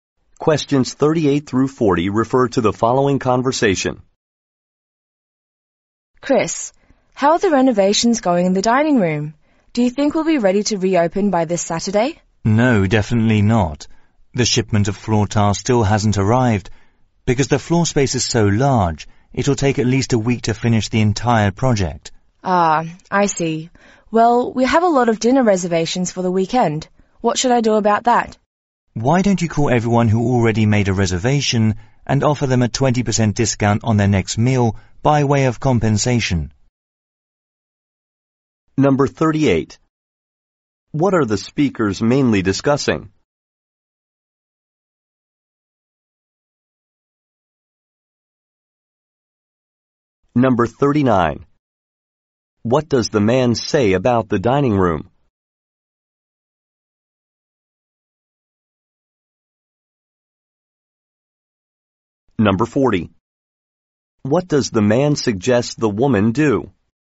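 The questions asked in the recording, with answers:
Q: What are the speakers mainly discussing?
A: Renovations of the dining room

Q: What does the man say about the dining room?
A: It won't be ready by Saturday; it will take at least a week

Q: What does the man suggest the woman do?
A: Call customers with reservations and offer a 20% discount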